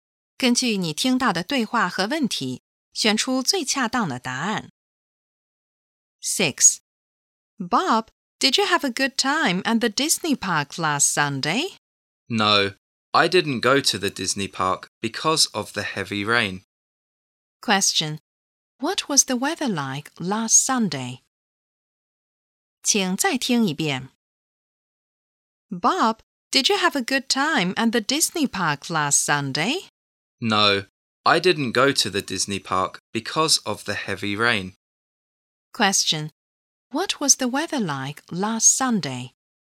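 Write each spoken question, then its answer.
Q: What was the weather like last Sunday?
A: It was rainy (heavy rain).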